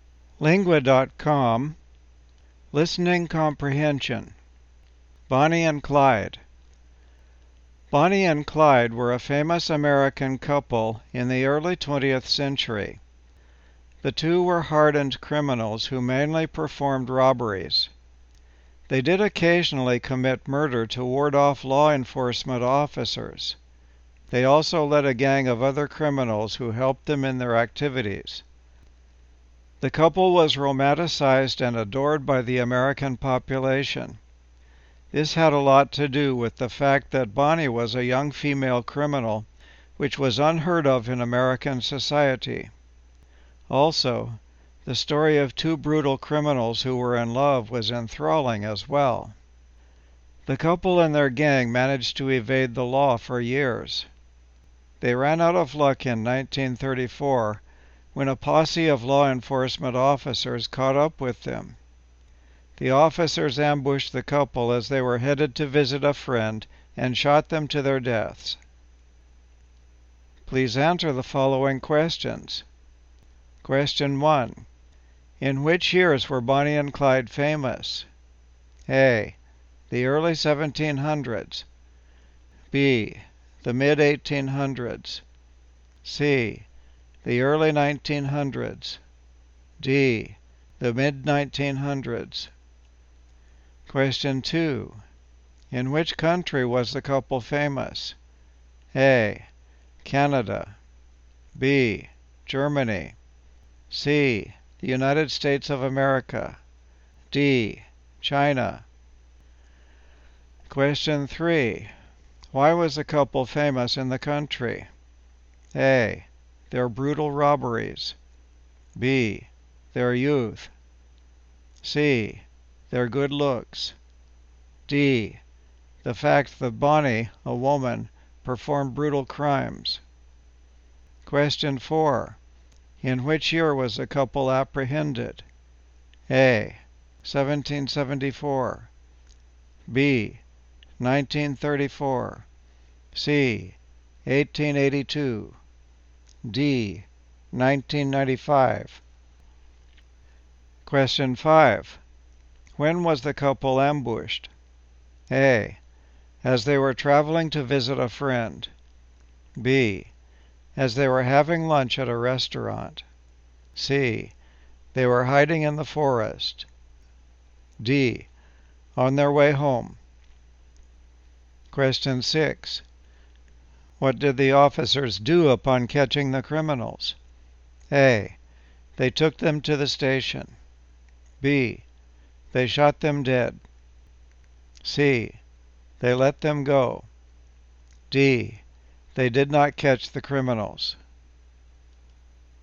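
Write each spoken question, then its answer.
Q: In which years were Bonnie and Clyde famous?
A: C: The early 1900s.

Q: In which country was the couple famous?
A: C: The United States of America.

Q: Why was the couple famous in the country?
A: D: The fact that Bonnie, a woman, performed brutal crimes.

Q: In which year was the couple apprehended?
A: B: 1934.

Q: When was the couple ambushed?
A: A: As they were traveling to visit a friend.

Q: What did the officers do upon catching the criminals?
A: B: They shot them dead.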